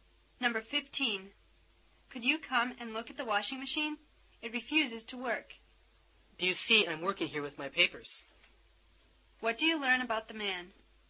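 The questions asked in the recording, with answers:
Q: What do you learn about the man?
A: He is too busy with his work to look at the washing machine.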